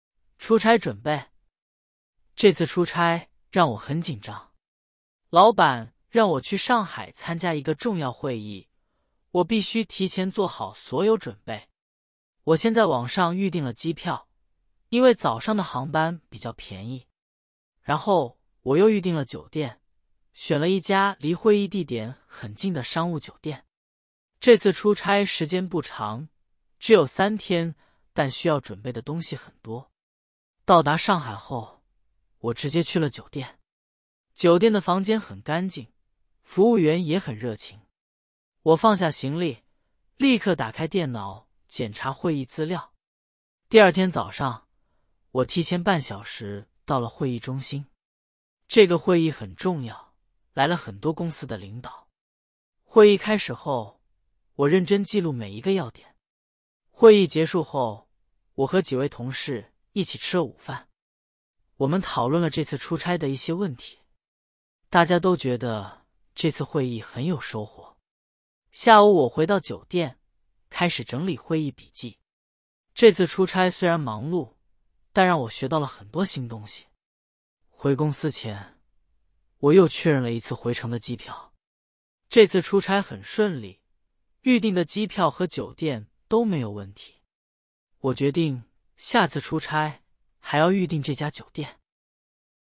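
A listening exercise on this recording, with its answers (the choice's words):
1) 作者这次出差时间很长。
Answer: 错

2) 作者预订的酒店离会议地点很近。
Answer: 对

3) 会议来了很多公司的领导。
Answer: 对

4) 作者下午去逛街了。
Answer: 错

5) 这次出差预订的机票和酒店都有问题。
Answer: 错

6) 作者出差去了哪个城市?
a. 北京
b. 上海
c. 广州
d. 深圳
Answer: 上海

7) 作者预订了几天的酒店?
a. 两天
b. 三天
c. 四天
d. 五天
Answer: 三天

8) 作者住的酒店怎么样?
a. 很脏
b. 很干净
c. 很吵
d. 很远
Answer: 很干净

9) 作者第二天早上提前多久到了会议中心?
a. 十分钟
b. 半小时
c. 一小时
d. 两小时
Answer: 半小时

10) 会议结束后大家觉得怎么样?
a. 没有收获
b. 很有收获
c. 很无聊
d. 很累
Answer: 很有收获

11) 作者决定下次出差还要预订哪家酒店?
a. 这家酒店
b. 另一家酒店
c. 不预订酒店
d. 随便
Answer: 这家酒店

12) 这次出差让作者感觉怎么样?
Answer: 很紧张

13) 作者为什么预订早上的航班?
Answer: 因为早上的航班比较便宜

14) 作者到达上海后先做了什么?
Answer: 直接去了酒店

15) 会议开始后作者做了什么?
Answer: 认真记录每一个要点

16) 会议结束后作者和谁一起吃了午饭?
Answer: 几位同事

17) 回公司前作者做了什么?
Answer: 又确认了一次回程的机票

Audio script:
出差准备
这次出差让我很紧张。老板让我去上海参加一个重要会议,我必须提前做好所有准备。我先在网上预订了机票,因为早上的航班比较便宜。然后我又预订了酒店,选了一家离会议地点很近的商务酒店。这次出差时间不长,只有三天,但需要准备的东西很多。
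到达上海后,我直接去了酒店。酒店的房间很干净,服务员也很热情。我放下行李,立刻打开电脑检查会议资料。第二天早上,我提前半小时到了会议中心。这个会议很重要,来了很多公司的领导。会议开始后,我认真记录每一个要点。
会议结束后,我和几位同事一起吃了午饭。我们讨论了这次出差的一些问题。大家都觉得这次会议很有收获。下午我回到酒店,开始整理会议笔记。这次出差虽然忙碌,但让我学到了很多新东西。
回公司前,我又确认了一次回程的机票。这次出差很顺利,预订的机票和酒店都没有问题。我决定下次出差还要预订这家酒店。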